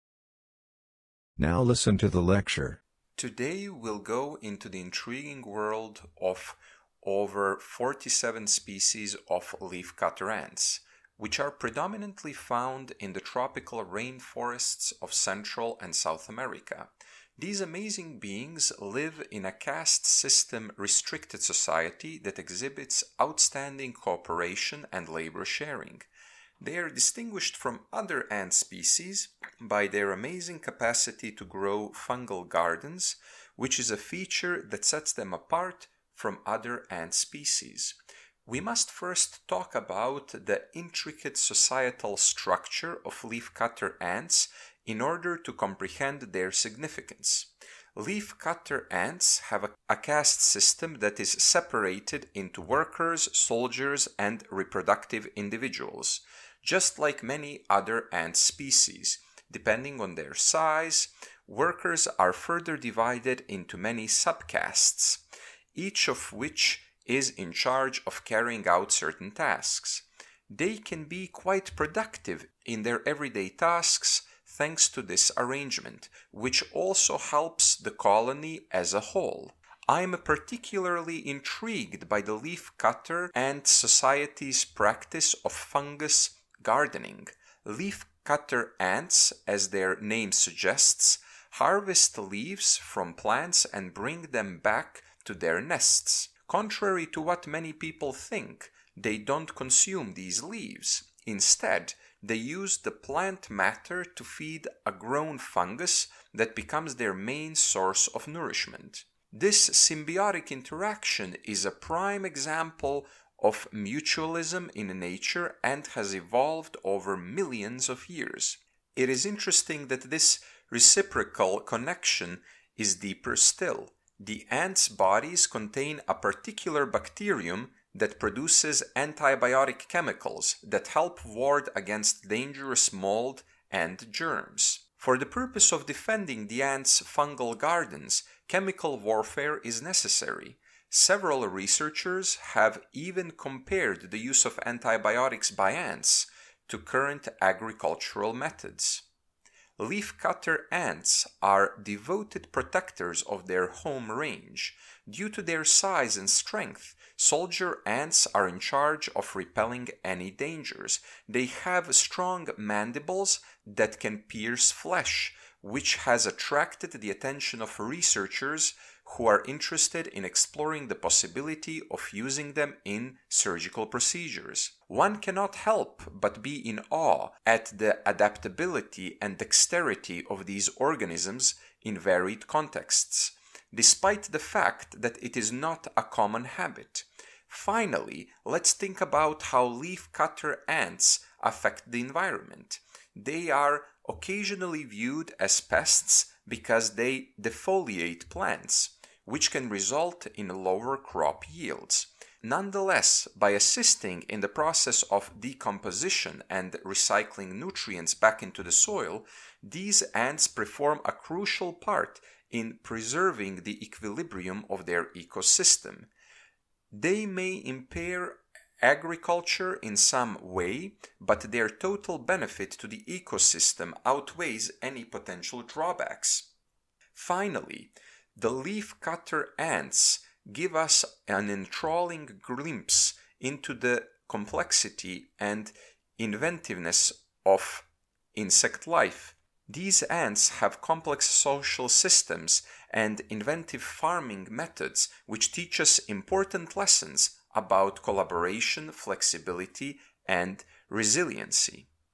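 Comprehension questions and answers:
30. When the professor expresses admiration, what specific aspect of leaf cutter ants does he highlight?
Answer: Their adaptability and dexterity

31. Regarding the potential use of leaf cutter ants' mandibles in surgical procedures, which statement best reflects the professor's stance?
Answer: He is impressed, even though it is not a common practice.

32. What does the professor imply about the pest status of leaf cutter ants in the context of their ecological role?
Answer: Although they are seen as pests, they play a crucial role in keeping their ecosystem balanced.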